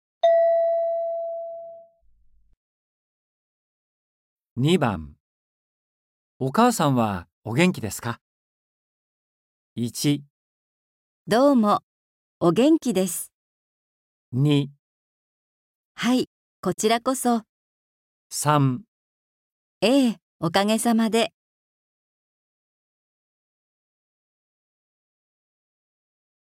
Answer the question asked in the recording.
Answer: 3

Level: N4.42